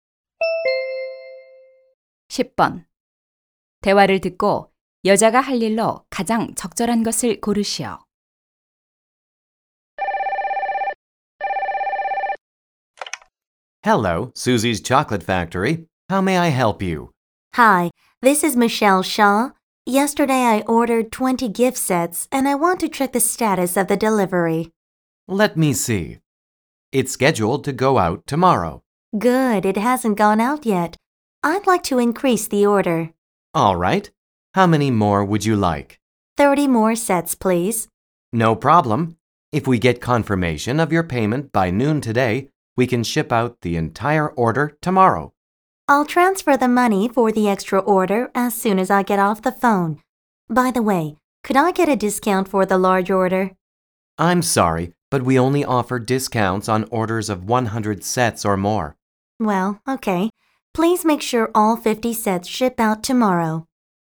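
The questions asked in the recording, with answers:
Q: 대화를 듣고 여자가 할 일로 가장 적절한 것을 고르시오.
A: 추가 주문 대금 송금하기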